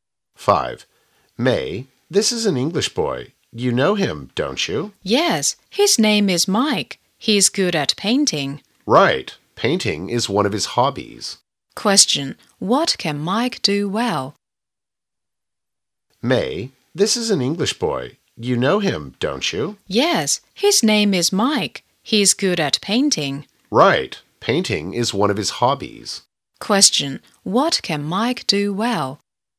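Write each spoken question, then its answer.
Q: what can Mike do well?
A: Painting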